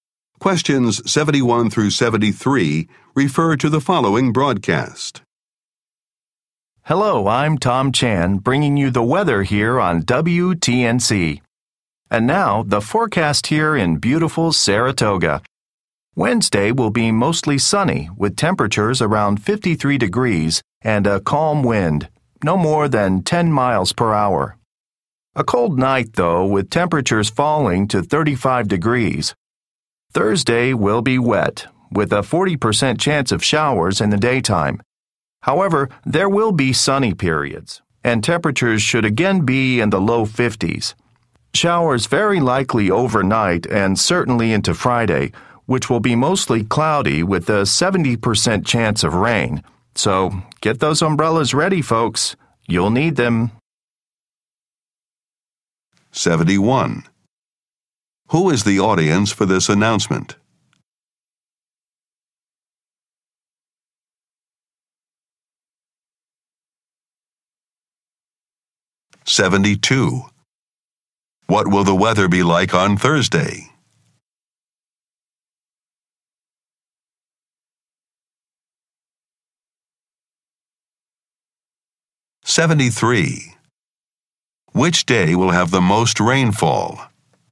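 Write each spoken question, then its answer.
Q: Who is the audience for this announcement?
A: Radio listeners in Saratoga

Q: What will the weather be like on Thursday?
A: Showers with sunny periods, low 50s

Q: Which day will have the most rainfall?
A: Friday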